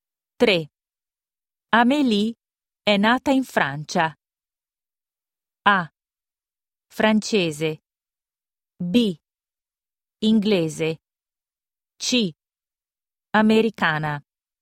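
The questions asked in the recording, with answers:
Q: Amélie è nata in Francia.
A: A: Francese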